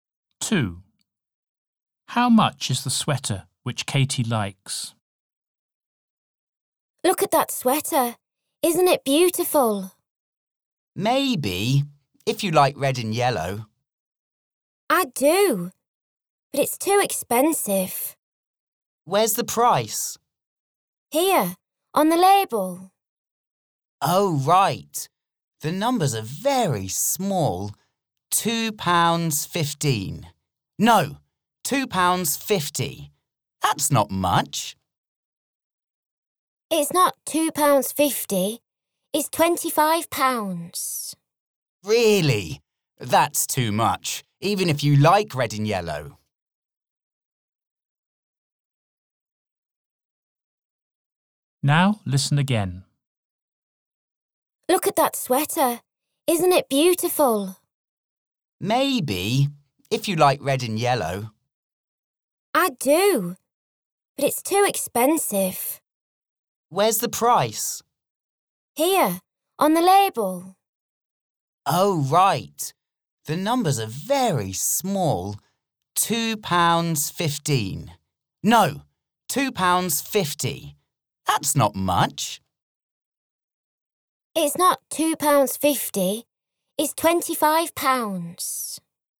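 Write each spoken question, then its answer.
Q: How much is the sweater which Katie likes?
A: £25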